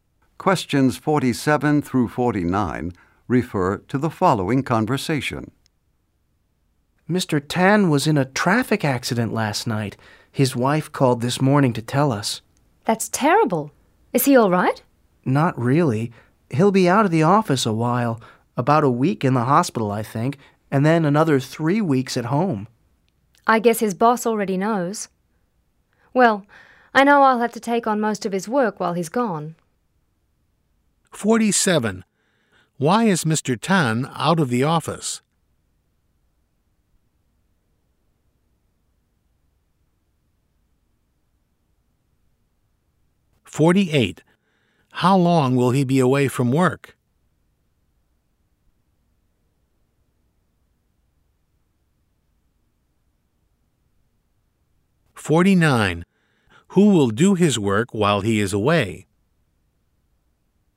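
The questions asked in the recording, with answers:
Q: Why is Mr. Tan out of the office?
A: He was in a traffic accident

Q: How long will he be away from work?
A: About four weeks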